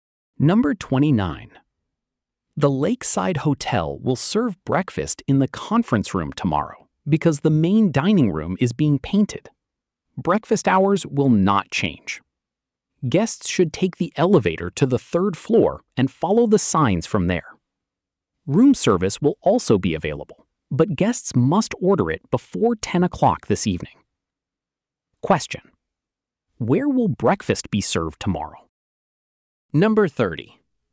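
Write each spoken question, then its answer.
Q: where will breakfast be served tomorrow?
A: In the conference room on the third floor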